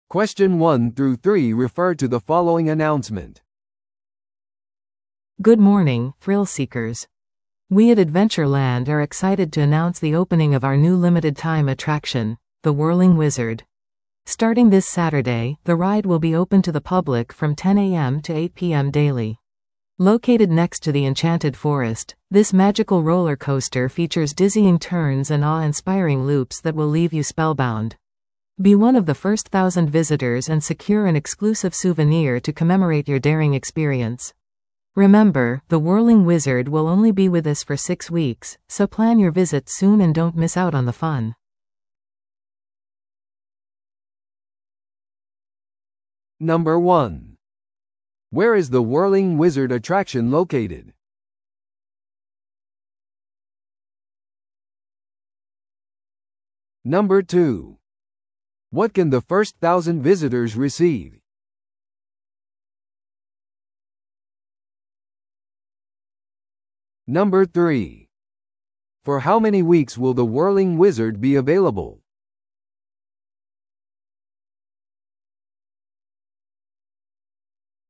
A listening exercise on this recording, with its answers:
Listen to the audio below and answer the questions.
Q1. Where is The Whirling Wizard attraction located?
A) エンチャンテッドフォレストの隣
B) ホーンテッドマンションの内部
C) 公園の入口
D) アドベンチャーランドの噴水の近く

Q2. What can the first thousand visitors receive?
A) 次回の来場時の割引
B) 無料の公園入場券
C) 独占的なお土産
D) 無料の食事券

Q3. For how many weeks will The Whirling Wizard be available?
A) 4週間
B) 6週間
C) 8週間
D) 10週間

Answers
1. A) エンチャンテッドフォレストの隣
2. C) 独占的なお土産
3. B) 6週間

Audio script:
Good morning, thrill-seekers! We at Adventure Land are excited to announce the opening of our new limited-time attraction: The Whirling Wizard! Starting this Saturday, the ride will be open to the public from 10am to 8pm daily. Located next to the Enchanted Forest, this magical roller coaster features dizzying turns and awe-inspiring loops that will leave you spellbound. Be one of the first thousand visitors and secure an exclusive souvenir to commemorate your daring experience! Remember, The Whirling Wizard will only be with us for six weeks, so plan your visit soon and don't miss out on the fun!

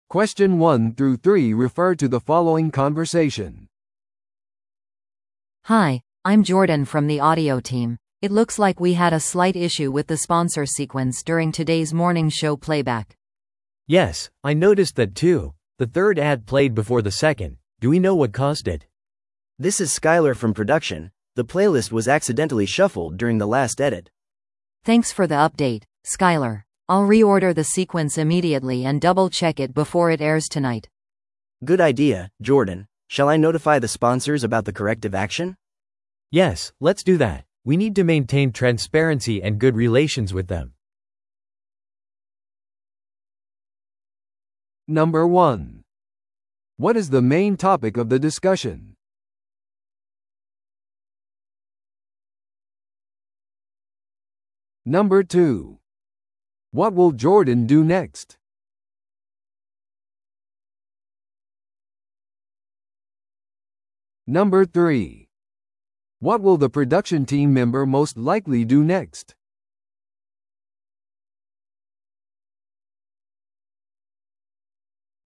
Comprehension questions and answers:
Listen to the audio below and answer the questions.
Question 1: What is the main topic of the discussion?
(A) 音響機器の技術的な問題。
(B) スポンサーとの関係を維持すること。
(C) スポンサー広告の順序に関するミス。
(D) ラジオショーのコンテンツの編集。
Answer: (C) スポンサー広告の順序に関するミス。

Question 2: What will Jordan do next?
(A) 問題についてスポンサーに連絡する。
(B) 次回のショーのプレイリストの順序を修正する。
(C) ラジオショーのコンテンツを編集する。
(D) 新しい音響機器を購入する。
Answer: (B) 次回のショーのプレイリストの順序を修正する。

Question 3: What will the production team member most likely do next?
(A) プレイリストを再びシャッフルする。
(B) シャッフルについて音響チームに知らせる。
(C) 修正措置についてスポンサーに通知する。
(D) 故障していないか音響機器をチェックする。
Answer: (C) 修正措置についてスポンサーに通知する。

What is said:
A: Hi, I'm Jordan from the audio team. It looks like we had a slight issue with the sponsor sequence during today's morning show playback.
B: Yes, I noticed that too. The third ad played before the second. Do we know what caused it?
C: This is Skyler from production, the playlist was accidentally shuffled during the last edit.
A: Thanks for the update, Skyler. I'll re-order the sequence immediately and double-check it before it airs tonight.
C: Good idea, Jordan. Shall I notify the sponsors about the corrective action?
B: Yes, let's do that. We need to maintain transparency and good relations with them.

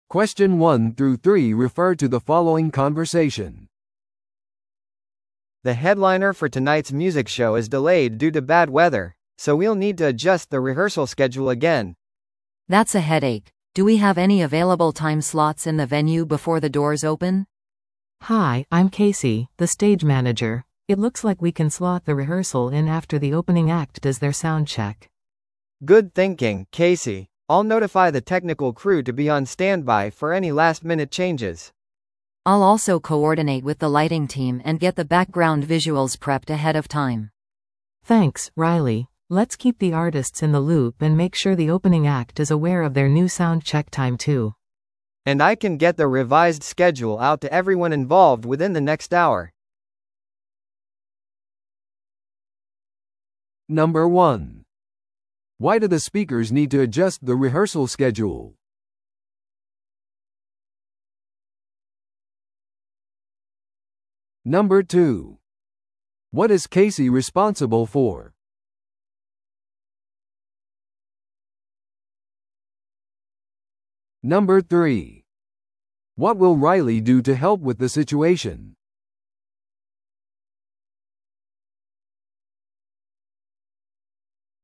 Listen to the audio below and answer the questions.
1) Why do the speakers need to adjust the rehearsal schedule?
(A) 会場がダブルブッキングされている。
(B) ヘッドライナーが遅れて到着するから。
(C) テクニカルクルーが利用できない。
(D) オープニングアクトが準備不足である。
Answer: (B) ヘッドライナーが遅れて到着するから。

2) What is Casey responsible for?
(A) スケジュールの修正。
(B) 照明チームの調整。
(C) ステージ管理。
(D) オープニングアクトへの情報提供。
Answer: (C) ステージ管理。

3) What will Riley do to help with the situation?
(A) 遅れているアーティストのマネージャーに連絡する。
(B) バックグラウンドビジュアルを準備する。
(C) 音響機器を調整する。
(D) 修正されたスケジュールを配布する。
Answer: (B) バックグラウンドビジュアルを準備する。

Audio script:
A: The headliner for tonight's music show is delayed due to bad weather, so we'll need to adjust the rehearsal schedule again.
B: That's a headache. Do we have any available time slots in the venue before the doors open?
C: Hi, I'm Casey, the stage manager. It looks like we can slot the rehearsal in after the opening act does their sound check.
A: Good thinking, Casey. I'll notify the technical crew to be on standby for any last-minute changes.
B: I'll also coordinate with the lighting team and get the background visuals prepped ahead of time.
C: Thanks, Riley. Let's keep the artists in the loop and make sure the opening act is aware of their new sound check time too.
A: And I can get the revised schedule out to everyone involved within the next hour.

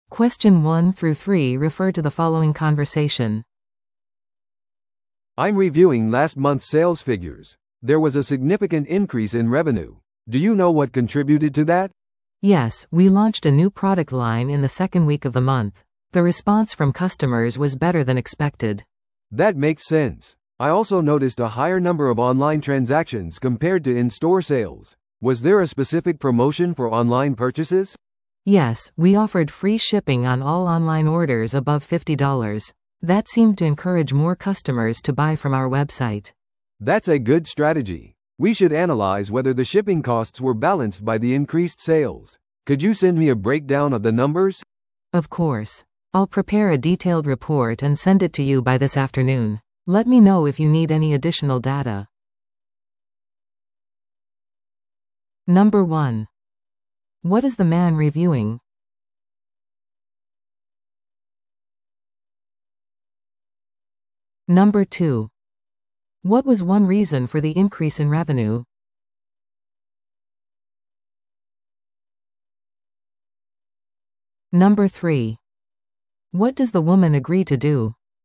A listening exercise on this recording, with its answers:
Listen to the audio below and answer the questions.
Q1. What is the man reviewing?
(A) 月次売上報告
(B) 顧客のクレーム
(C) 従業員のパフォーマンス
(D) マーケティング費用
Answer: (A) 月次売上報告

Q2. What was one reason for the increase in revenue?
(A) 価格の引き上げ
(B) 新製品の発売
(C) コスト削減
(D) 新店舗のオープン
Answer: (B) 新製品の発売

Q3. What does the woman agree to do?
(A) レポートを提供する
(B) 会議を開く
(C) 新しい広告を作成する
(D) 配送料を削減する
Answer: (A) レポートを提供する

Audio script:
A: "I'm reviewing last month's sales figures. There was a significant increase in revenue. Do you know what contributed to that?"
B: "Yes, we launched a new product line in the second week of the month. The response from customers was better than expected."
A: "That makes sense. I also noticed a higher number of online transactions compared to in-store sales. Was there a specific promotion for online purchases?"
B: "Yes, we offered free shipping on all online orders above fifty dollars. That seemed to encourage more customers to buy from our website."
A: "That's a good strategy. We should analyze whether the shipping costs were balanced by the increased sales. Could you send me a breakdown of the numbers?"
B: "Of course. I'll prepare a detailed report and send it to you by this afternoon. Let me know if you need any additional data."

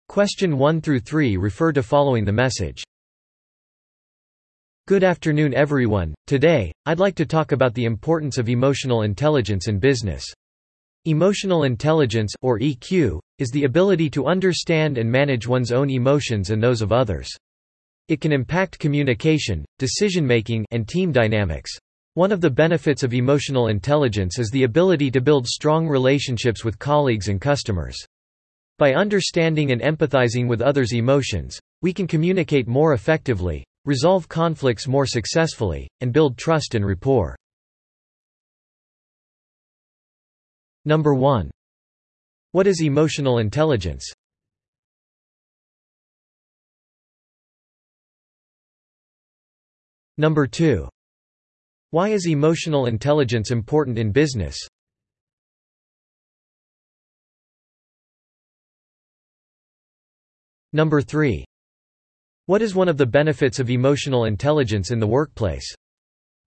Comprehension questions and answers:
Listen to the audio below and answer the questions.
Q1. What is emotional intelligence?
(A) 自分自身と他人の感情を理解し、管理する能力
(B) 複数の言語を流暢に話す能力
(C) 複雑な数学的計算を実行する能力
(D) 楽器を演奏する能力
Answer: (A) 自分自身と他人の感情を理解し、管理する能力

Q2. Why is emotional intelligence important in business?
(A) コミュニケーション、意思決定、チームのダイナミクスを改善できる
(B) 売上高を増やすことができる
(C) 運用コストを削減できる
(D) 製造効率を向上できる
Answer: (A) コミュニケーション、意思決定、チームのダイナミクスを改善できる

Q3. What is one of the benefits of emotional intelligence in the workplace?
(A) より速く作業する能力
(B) より多くのお金を稼ぐ能力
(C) 同僚や顧客と強い関係を築く能力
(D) 対立を完全に回避する能力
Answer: (C) 同僚や顧客と強い関係を築く能力

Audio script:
Today, I'd like to talk about the importance of emotional intelligence in business. Emotional intelligence, or EQ, is the ability to understand and manage one's own emotions and those of others. it can impact communication, decision-making, and team dynamics.
One of the benefits of emotional intelligence is the ability to build strong relationships with colleagues and customers. By understanding and empathizing with others' emotions, we can communicate more effectively, resolve conflicts more successfully, and build trust and rapport."

